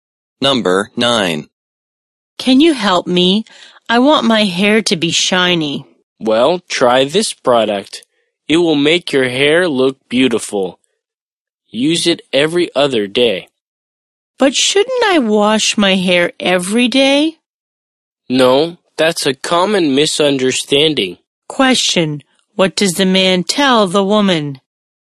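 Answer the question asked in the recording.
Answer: She shouldn't wash her hair every day; use the product every other day.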